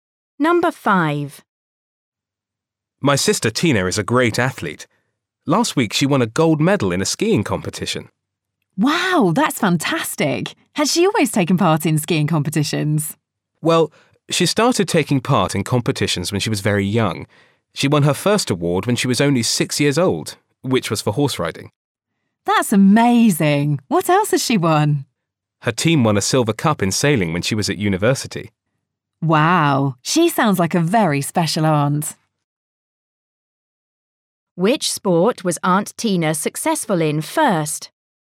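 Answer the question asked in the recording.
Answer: Horse riding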